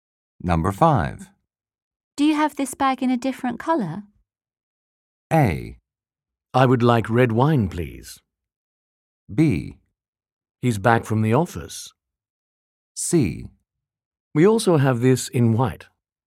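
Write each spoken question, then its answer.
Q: Do you have this bag in a different color?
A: C: We also have this in white.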